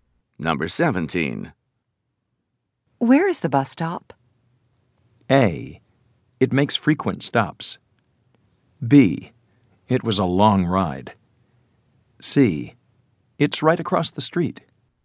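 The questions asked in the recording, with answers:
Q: Where is the bus stop?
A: C: It's right across the street.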